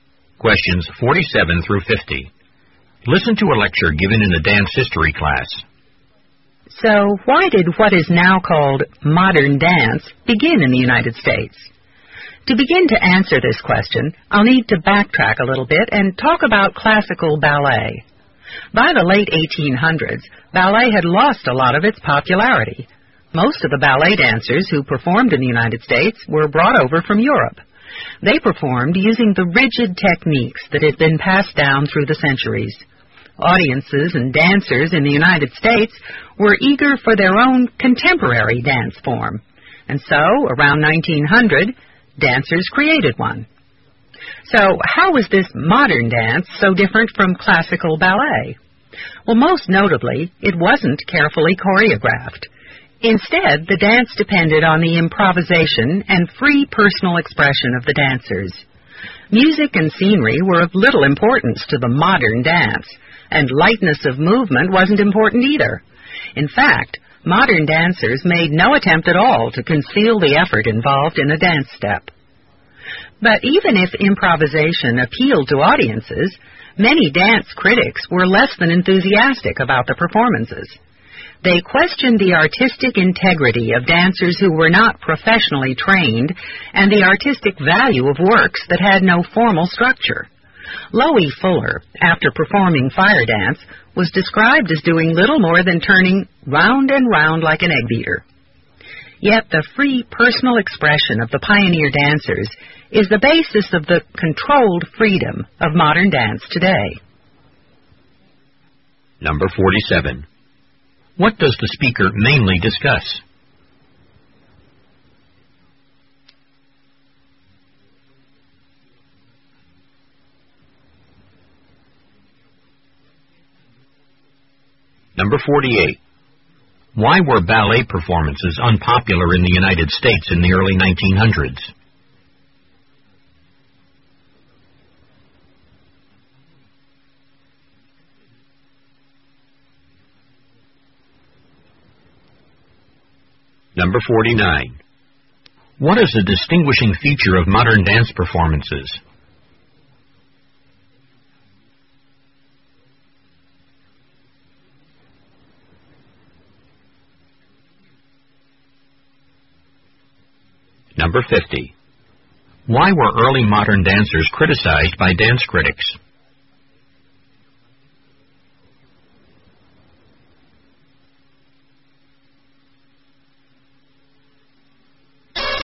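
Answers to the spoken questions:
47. The origins of modern dance in the United States
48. They used rigid European techniques; audiences wanted a contemporary dance form
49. Improvisation and free personal expression
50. They weren't professionally trained and their works had no formal structure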